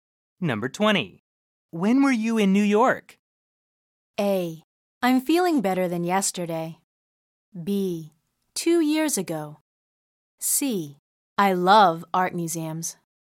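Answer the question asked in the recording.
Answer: B: 2 years ago.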